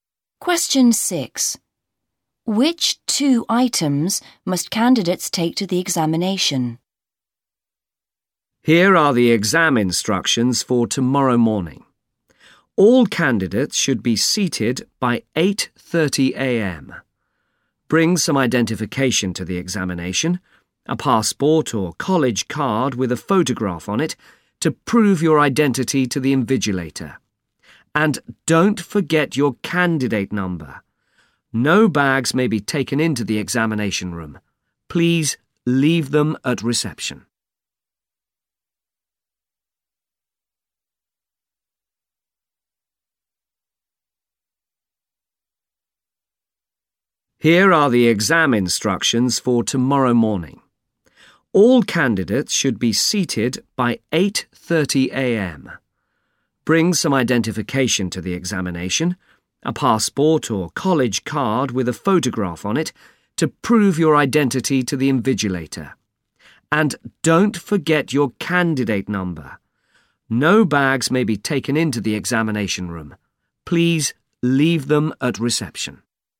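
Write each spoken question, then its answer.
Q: Which two items must candidates take to the examination?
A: Identification (a passport or college card with a photo) and their candidate number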